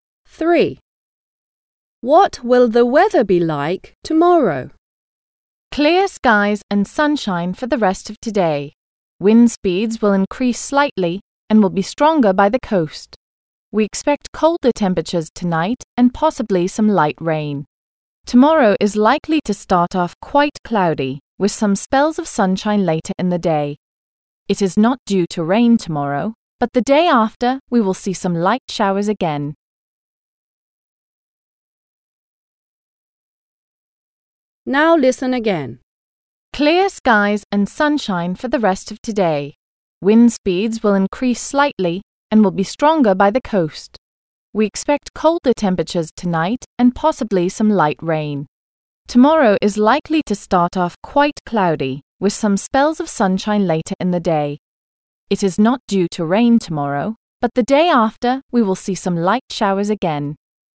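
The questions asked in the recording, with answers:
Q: What will the weather be like tomorrow?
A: cloudy at first, with some sunshine later, and no rain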